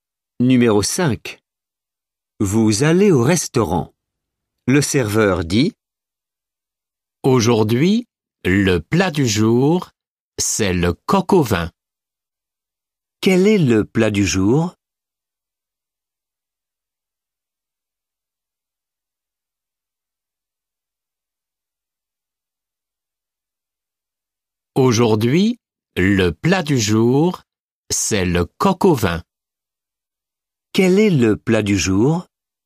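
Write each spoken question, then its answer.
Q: Quel est le plat du jour?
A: le coq au vin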